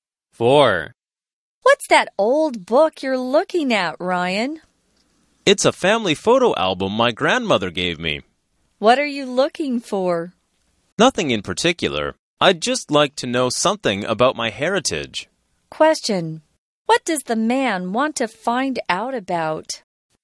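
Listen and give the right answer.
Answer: His family heritage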